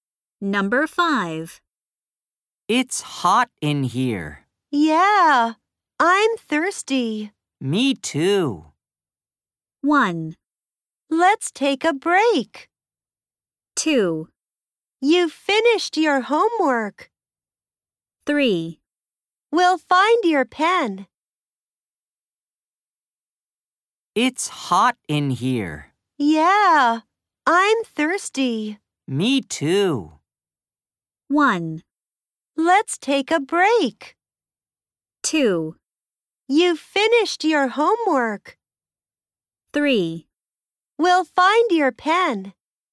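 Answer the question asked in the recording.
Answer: 1: Let's take a break.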